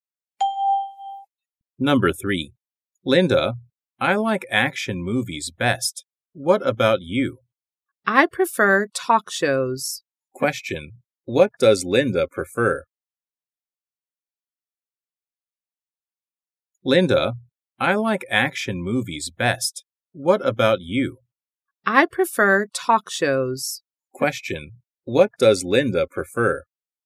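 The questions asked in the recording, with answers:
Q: what does Linda prefer?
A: Talk shows.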